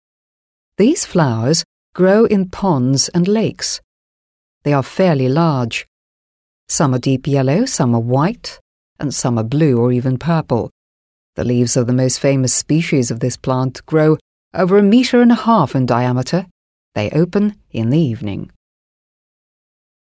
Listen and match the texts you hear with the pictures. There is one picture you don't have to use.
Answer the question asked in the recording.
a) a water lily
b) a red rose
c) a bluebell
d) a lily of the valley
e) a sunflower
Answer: a) a water lily

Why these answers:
Ключевые слова здесь — места обитания: «ponds and lakes» (пруды и озера). Это среда обитания для water lily (водяной лилии).

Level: 7 класс